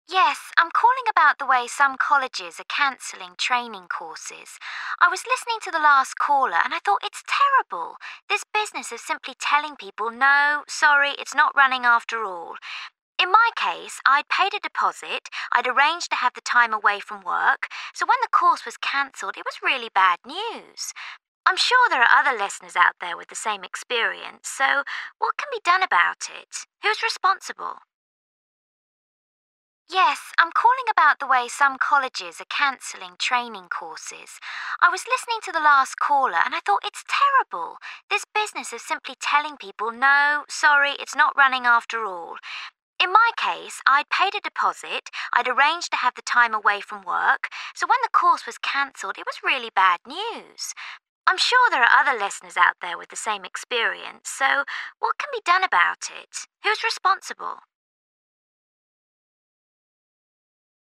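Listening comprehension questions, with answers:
Part 1: Listen to short texts and choose A,B, or C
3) You hear a caller on a radio phone-in programme. Why has she phoned?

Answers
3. To complain about colleges cancelling training courses.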